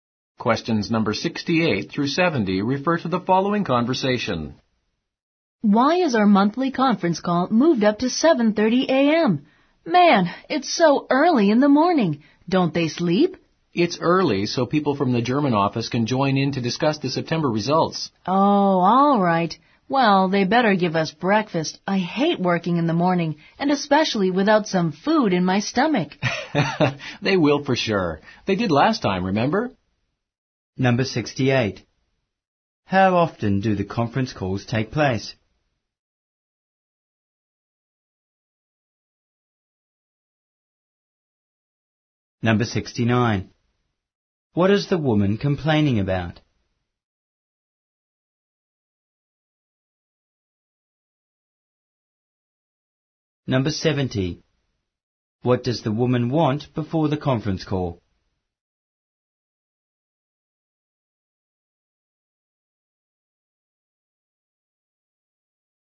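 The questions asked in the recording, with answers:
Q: How often do the conference calls take place?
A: Monthly

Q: What is the woman complaining about?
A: The call is too early in the morning

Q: What does the woman want before the conference call?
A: Breakfast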